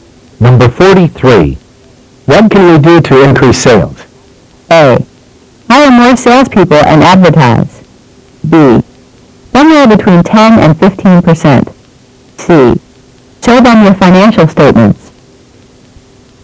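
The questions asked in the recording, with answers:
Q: What can we do to increase sales?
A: A: Hire more salespeople and advertise.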